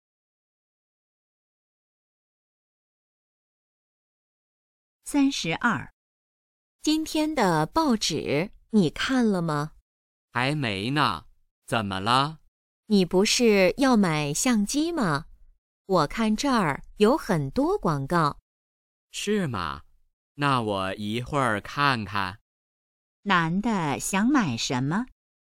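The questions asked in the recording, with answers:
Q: 男的想买什么?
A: 相机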